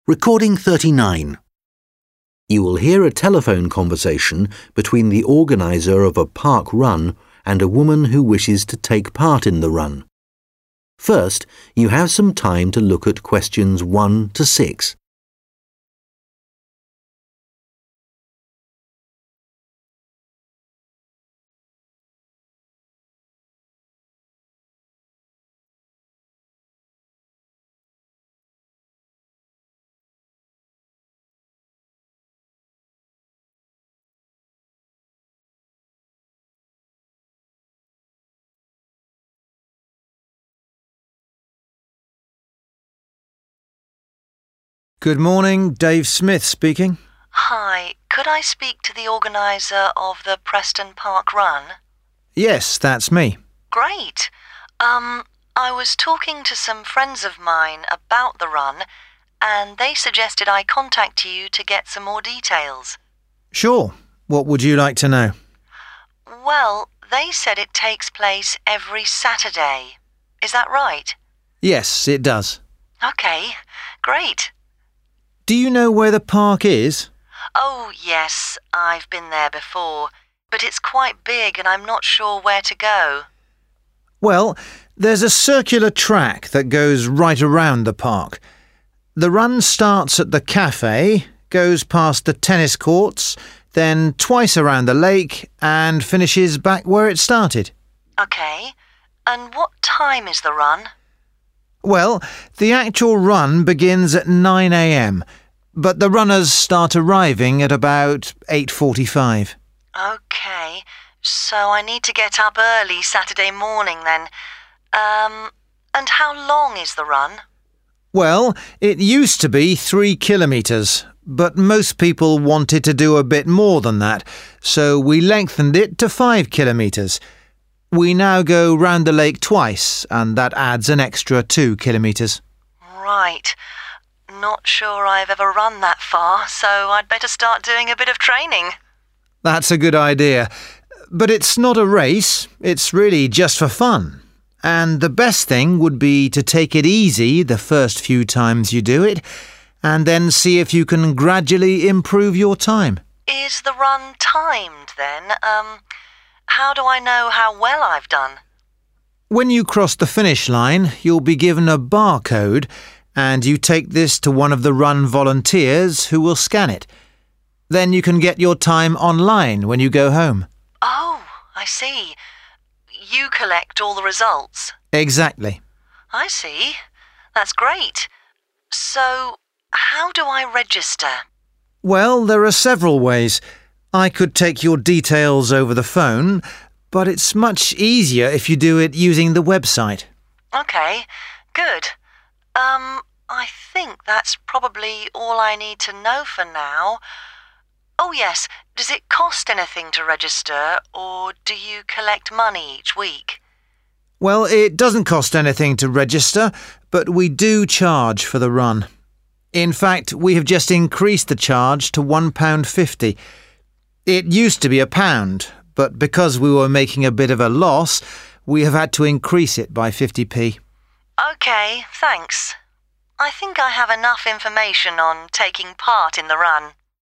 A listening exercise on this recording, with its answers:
Complete the notes below. Write NO MORE THAN TWO WORDS AND / OR A NUMBER for each answer.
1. Start of run: in front of the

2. Time of start:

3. Length of run:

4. At end of run: volunteer scans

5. Best way to register: on the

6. Cost of run:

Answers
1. Cafe
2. 9/nine am/9/nine o' clock
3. 5/five km/kilometres/kilometres
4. bar(-)code/ (a) barcode/barcode
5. website
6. 1.50

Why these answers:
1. Người đàn ông nói rằng cuộc chạy bắt đầu ở quán cà phê. Vì thế, vị trí bắt đầu là in front of the café.
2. Cuộc chạy chính thức bắt đầu lúc 9 giờ sáng, dù thí sinh tham gia chạy bắt đầu đến từ 8h45.
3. Ban đầu là 3km, sau tăng lên 5km. Người đàn ông nhấn mạnh độ dài hiện tại là 5 kilometres.
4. Sau khi kết thúc cuộc chạy, bạn nhận được một mã vạch và đưa nó cho tình nguyện viên để quét.
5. Mặc dù có thể đăng ký qua điện thoại, nhưng đăng ký qua website là dễ nhất.
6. Chi phí hiện tại là £1.50, đã tăng thêm 50p từ trước.